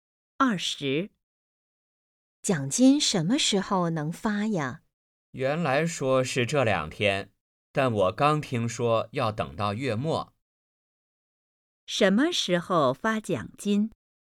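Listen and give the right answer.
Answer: 月末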